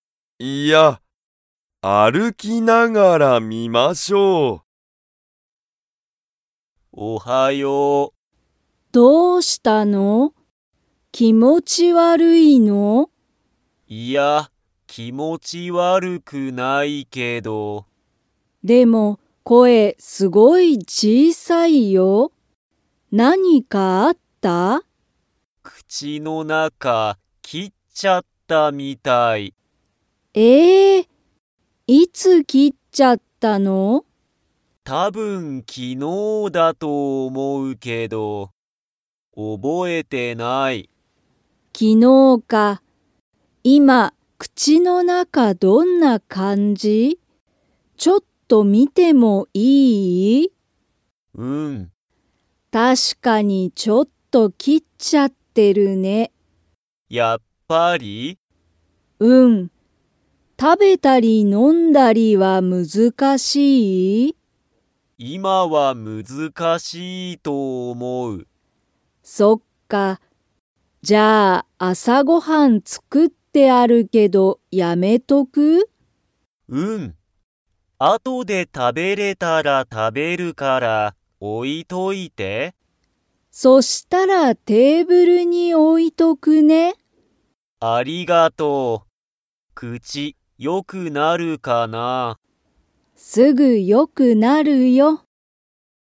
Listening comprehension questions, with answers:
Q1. リュウジは、____がすごい小(ちい)さい。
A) 口(くち)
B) ごはん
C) 中(なか)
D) 声(こえ)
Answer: D) 声(こえ)

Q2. リュウジは、今いまから朝あさごはんを食(た)べますか?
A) はい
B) いいえ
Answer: B) いいえ

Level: Level 2

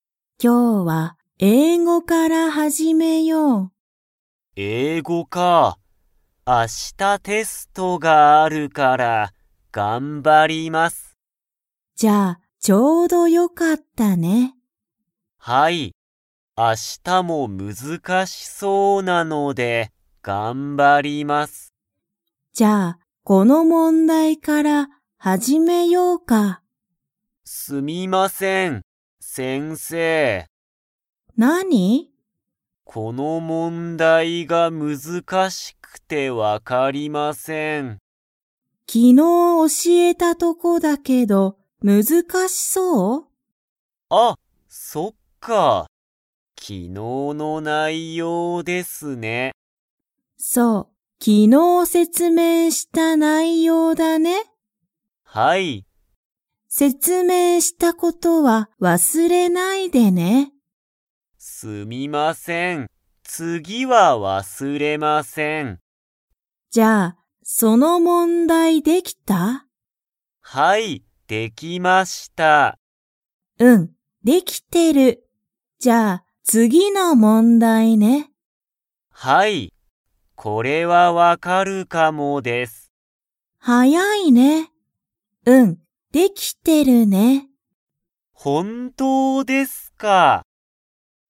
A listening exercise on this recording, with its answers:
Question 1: ヒロシは明日(あした)、英語(えいご)の____がある。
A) 説明(せつめい)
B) カフェ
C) 問題(もんだい)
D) テスト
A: D) テスト

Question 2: ヒロシは、次(つぎ)の問題(もんだい)はできましたか?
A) はい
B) いいえ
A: A) はい

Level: Level 2

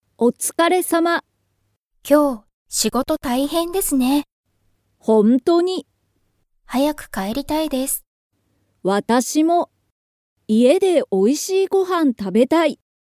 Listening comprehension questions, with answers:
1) 今日(きょう)は仕事(しごと)が_____。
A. おいしい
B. 早(はや)い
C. 一緒(いっしょ)だ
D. 大変(たいへん)だ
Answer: D. 大変(たいへん)だ

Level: Level 1

